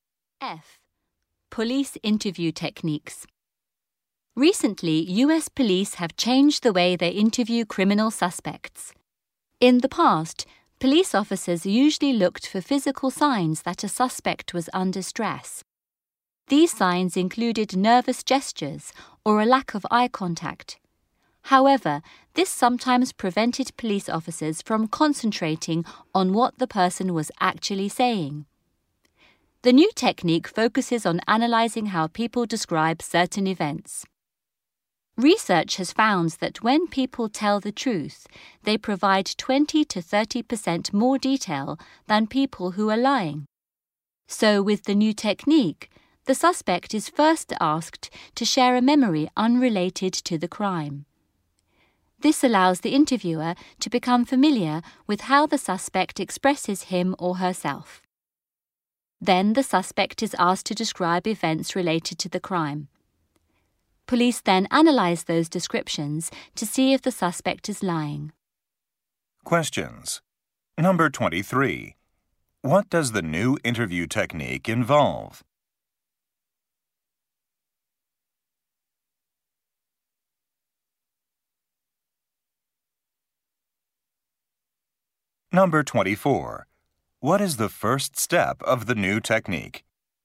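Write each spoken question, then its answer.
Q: What does the new interview technique involve?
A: Analyzing how suspects describe events, including how much detail they give.

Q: What is the first step of the new technique?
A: The suspect is asked to share a memory that has nothing to do with the crime.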